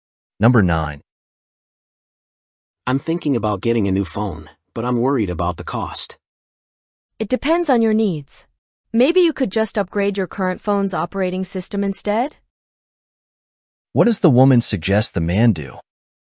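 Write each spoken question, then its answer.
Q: What does the woman suggest the man do?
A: Upgrade his current phone's operating system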